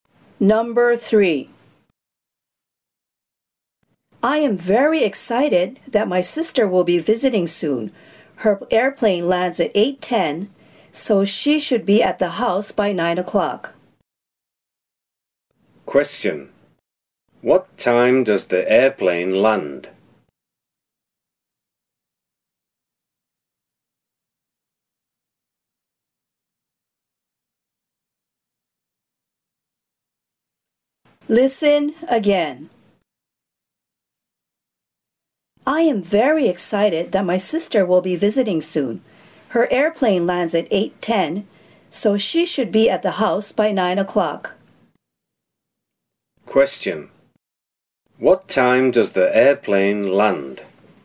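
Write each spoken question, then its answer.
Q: What time does the airplane land?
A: 8:10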